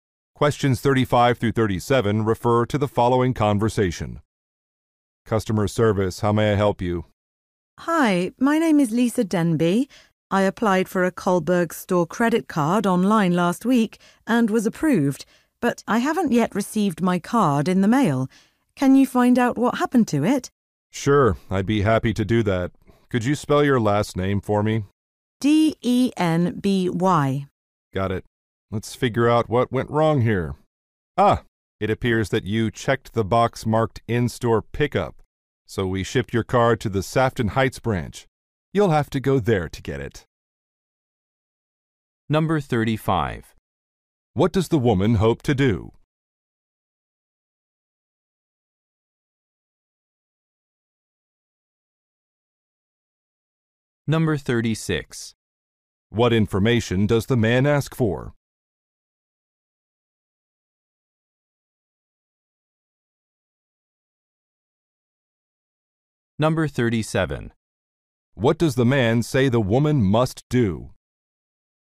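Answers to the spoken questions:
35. Find out what happened to her store credit card
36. The spelling of her last name
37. Go to the Sefton Heights branch to get her card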